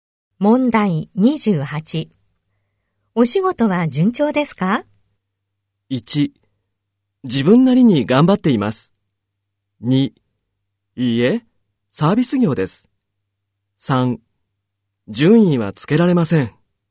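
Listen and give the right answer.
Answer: 1: 自分なりに頑張っています。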